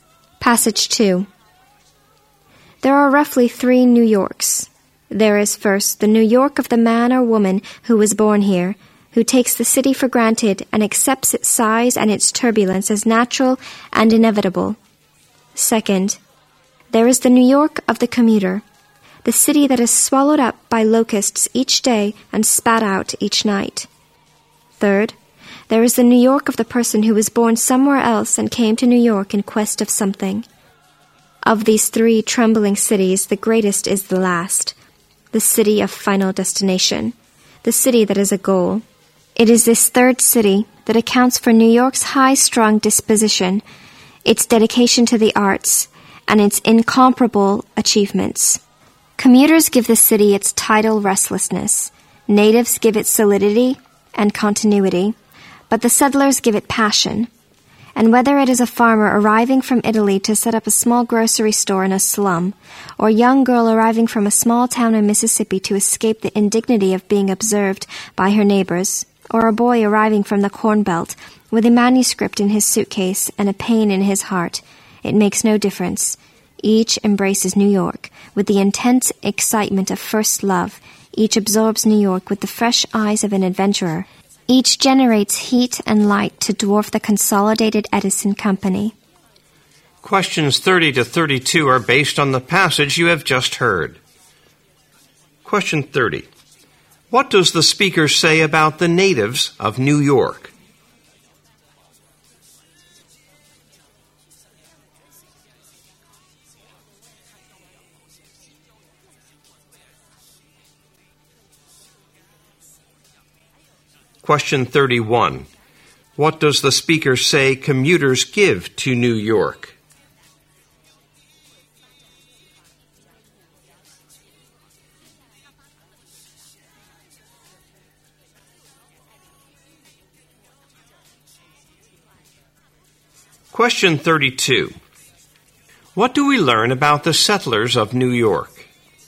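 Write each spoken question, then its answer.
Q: What does the speaker say about the natives of New York?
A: They take the city for granted and give it solidity and continuity.

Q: What does the speaker say commuters give to New York?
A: Tidal restlessness.

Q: What do we learn about the settlers of New York?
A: They give the city passion and embrace it with the excitement of first love.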